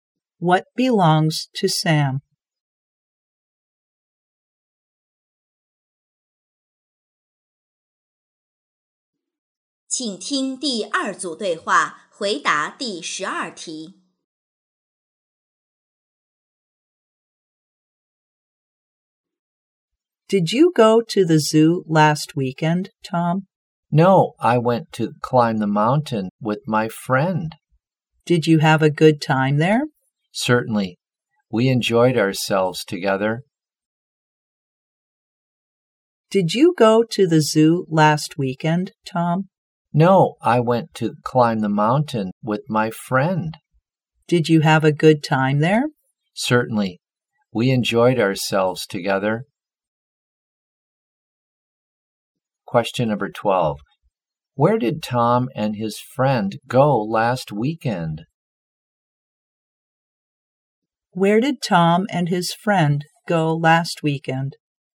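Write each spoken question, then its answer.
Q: Where did Tom and his friend go last weekend?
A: They went to climb the mountain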